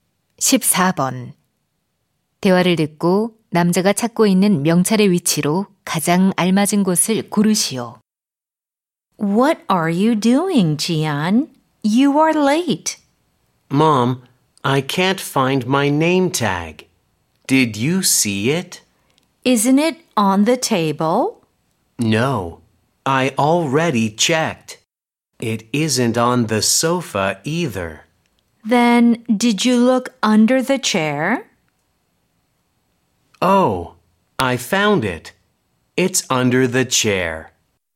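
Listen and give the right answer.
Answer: 의자 아래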